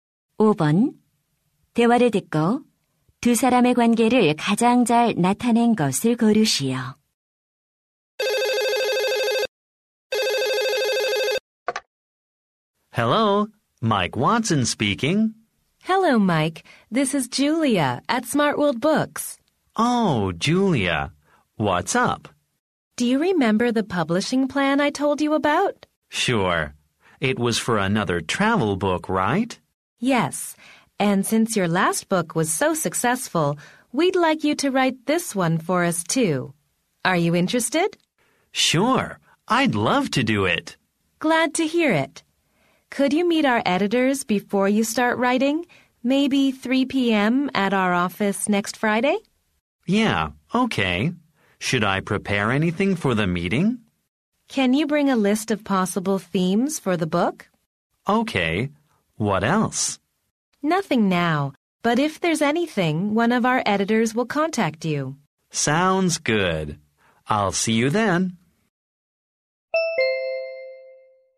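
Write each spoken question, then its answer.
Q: 대화를 듣고 두 사람의 관계를 가장 잘 나타낸 것을 고르시오.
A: 작가 - 출판사 직원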